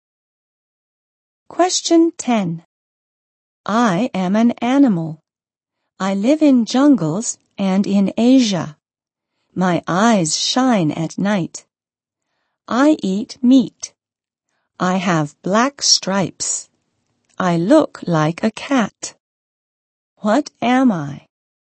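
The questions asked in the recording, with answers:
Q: What am I?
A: A tiger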